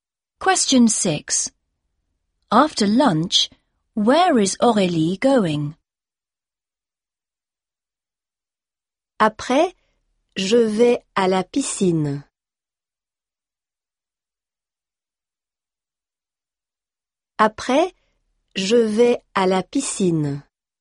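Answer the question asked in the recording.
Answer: To the swimming pool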